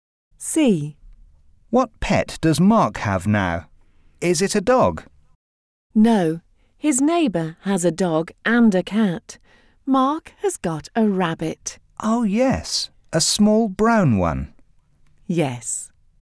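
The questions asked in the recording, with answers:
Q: What pet does Mark have now?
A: A rabbit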